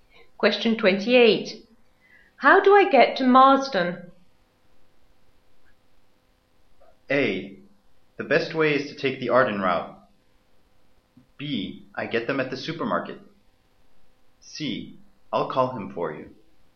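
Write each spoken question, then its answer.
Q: How do I get to Marsden?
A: A: The best way is to take the Arden route.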